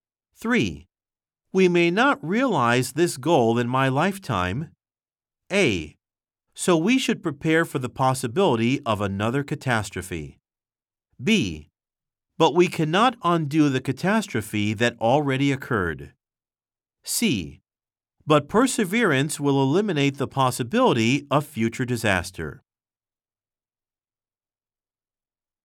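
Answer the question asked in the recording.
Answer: C: But perseverance will eliminate the possibility of future disaster.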